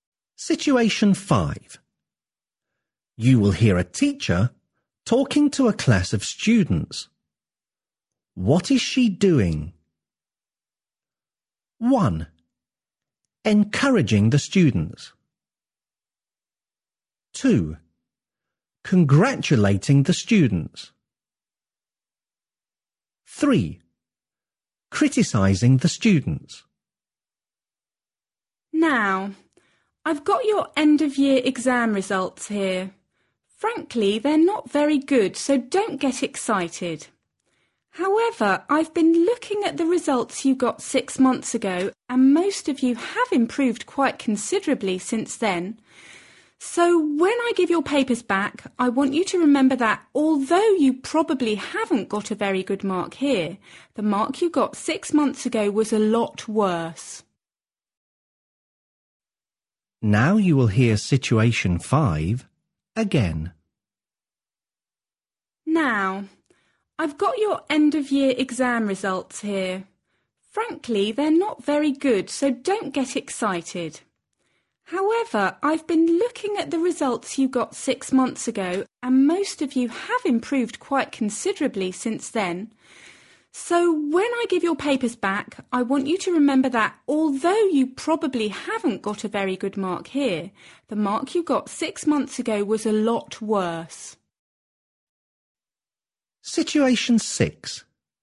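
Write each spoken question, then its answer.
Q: What is she doing?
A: 1: Encouraging the students.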